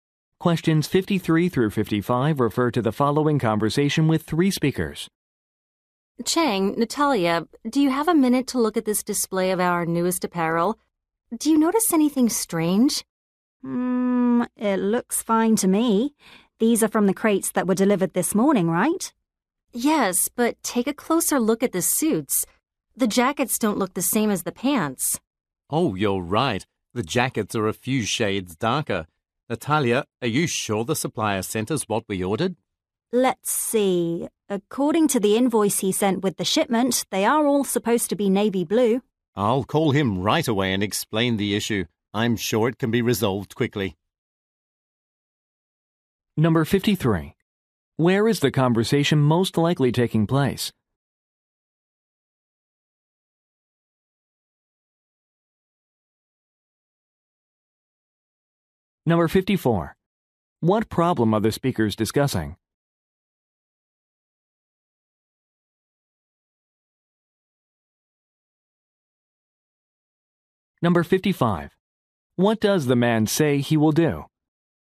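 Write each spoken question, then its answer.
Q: Where is the conversation most likely taking place?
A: At a clothing store

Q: What problem are the speakers discussing?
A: The suit jackets don't match the pants in color

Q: What does the man say he will do?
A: Call the supplier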